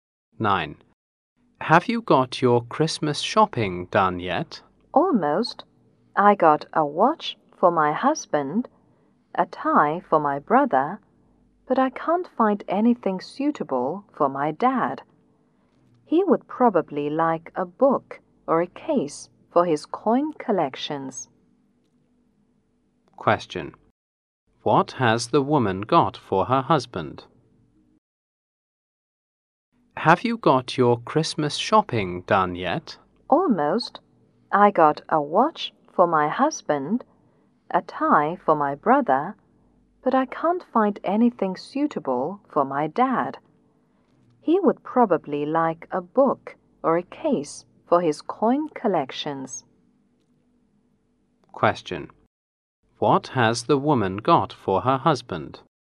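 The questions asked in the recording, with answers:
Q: What has the woman got for her husband?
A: A watch.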